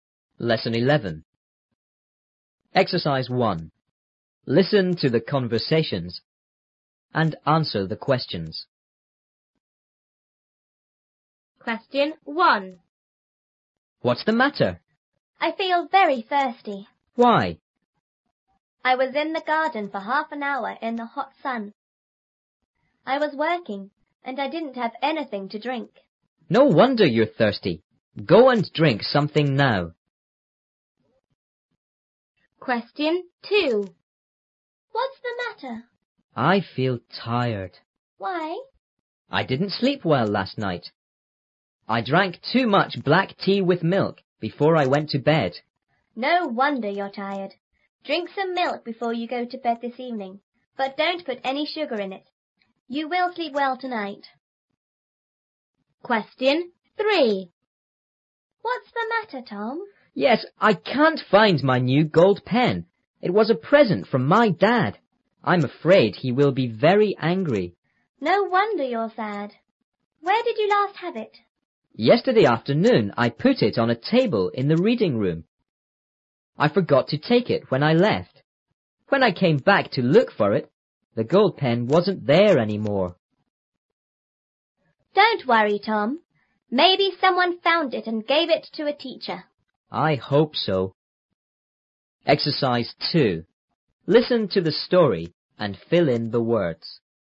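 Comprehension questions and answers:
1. a)How long did the girl stay in the garden?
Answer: 30 minutes.

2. b)What was the girl doing in the garden?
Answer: She was working.

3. to drink before he goes to bed? ______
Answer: Some milk without sugar.

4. a)Where did Tom last see his gold pen? ______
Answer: On a table in the reading room.

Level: 初中英语广州版3B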